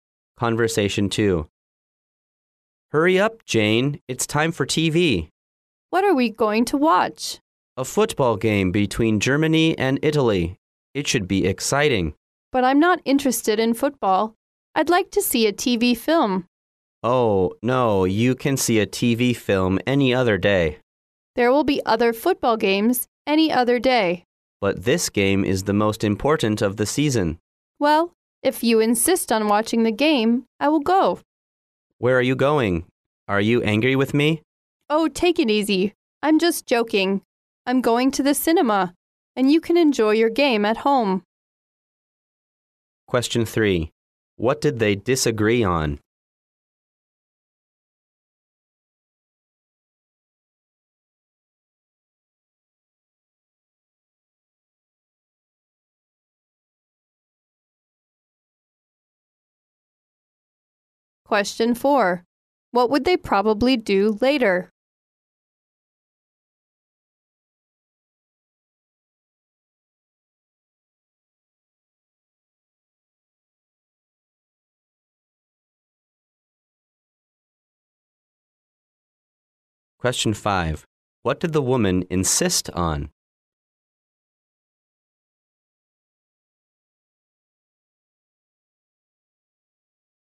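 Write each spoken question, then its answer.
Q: What did they disagree on?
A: Which TV program to watch

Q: What would they probably do later?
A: One watches the football game at home and the other goes to the cinema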